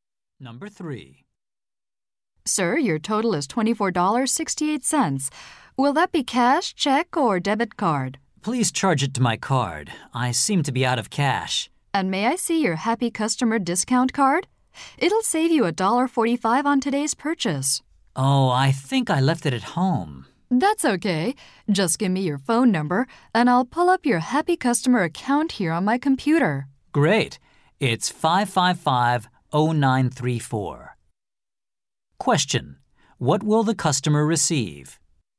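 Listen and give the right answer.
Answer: A $1.45 discount on his purchase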